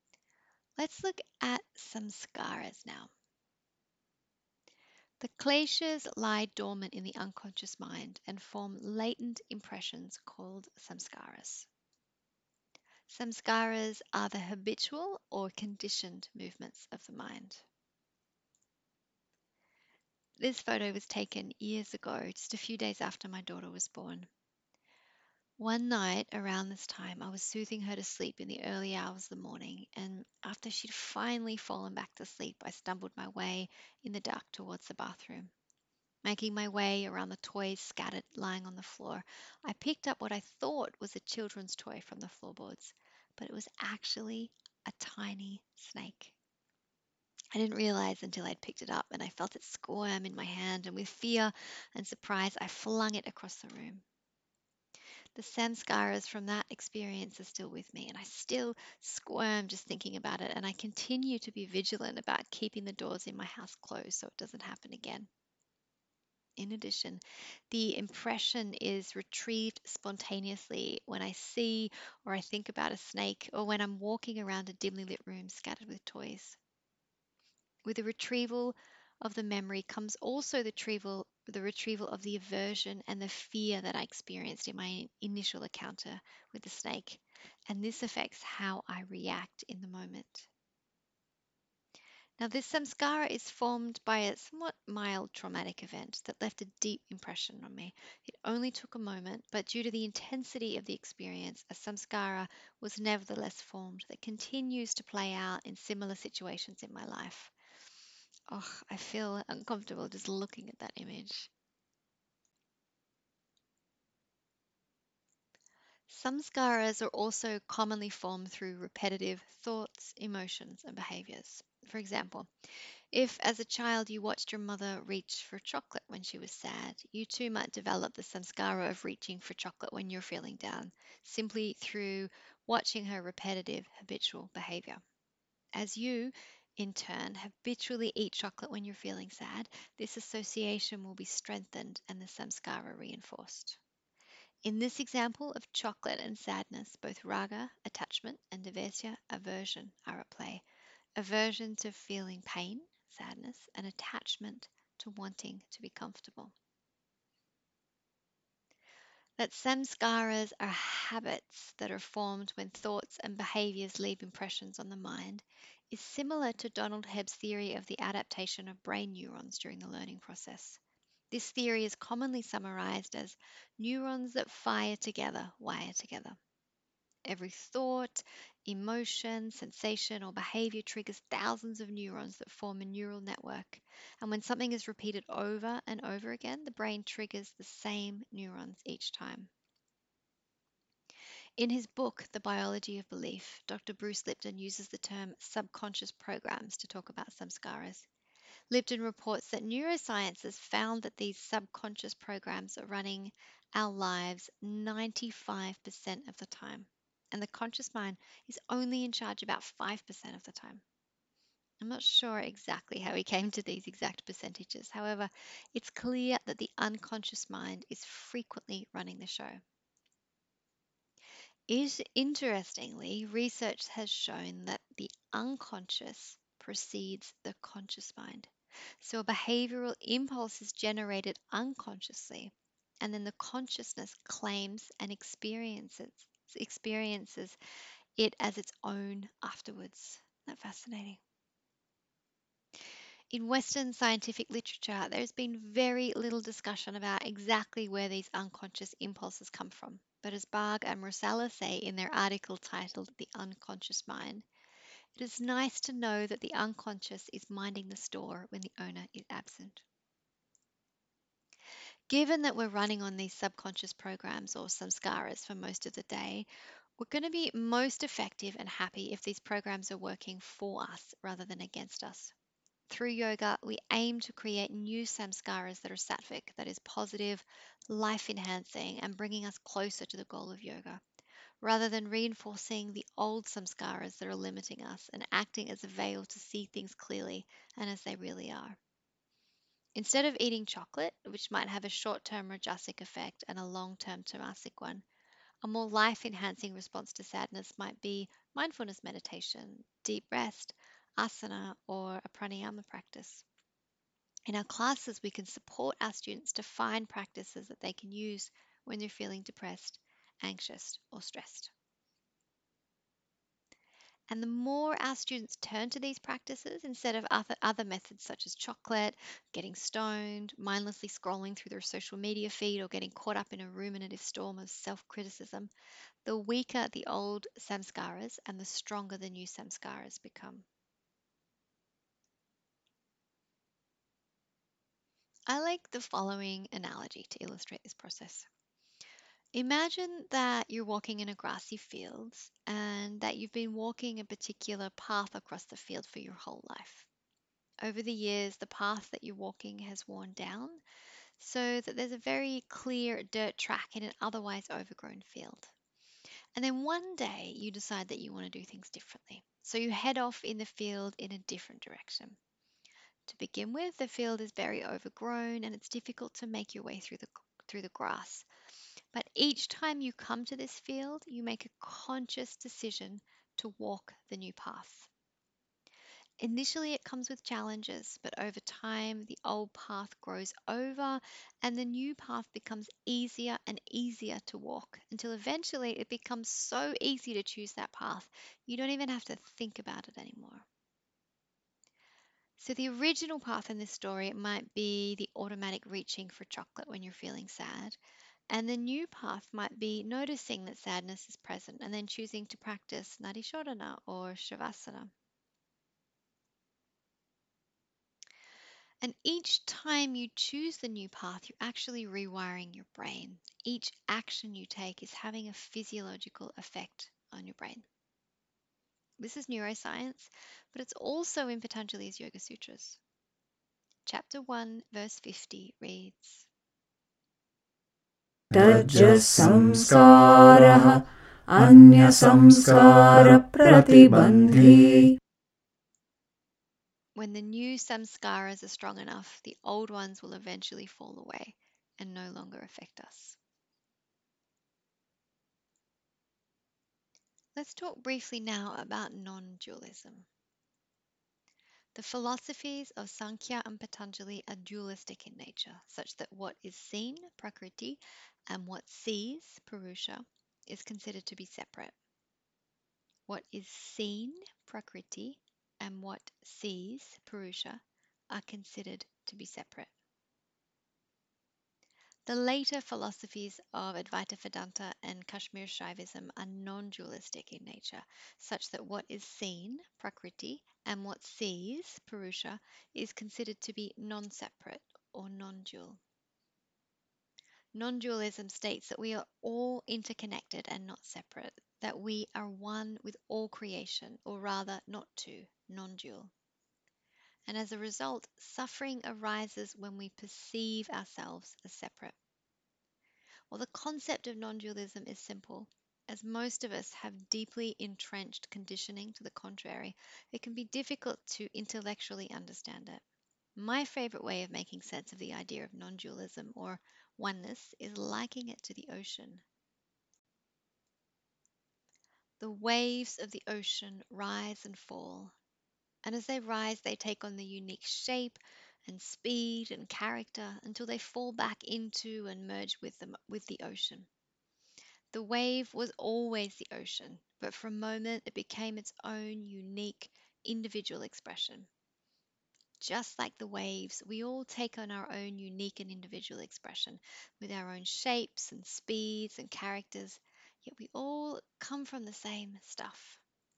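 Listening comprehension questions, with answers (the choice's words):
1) What are saṃskāras?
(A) The habitual or conditioned movements of the mind.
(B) A series of yoga āsanas.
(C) An advanced prāṇāyama practice.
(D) None of the above.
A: The habitual or conditioned movements of the mind.

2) What is non-dualism?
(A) The idea that there are more than two of everything on earth.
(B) The idea that for every action, there is an equal and opposite reaction.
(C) The idea that what is seen (Prakṛiti) and what is sees (Puruṣa) is separate, as described in the philosophies of Sāṅkhya and Patañjali.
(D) The idea that what is seen (Prakṛiti) and what sees (Puruṣa) are not separate, as described in the philosophies of Advaita Vedanta and Kashmir Shaivism.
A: The idea that what is seen (Prakṛiti) and what sees (Puruṣa) are not separate, as described in the philosophies of Advaita Vedanta and Kashmir Shaivism.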